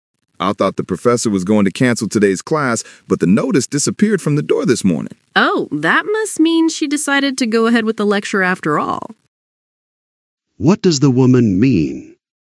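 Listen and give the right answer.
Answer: The professor decided to hold the class after all.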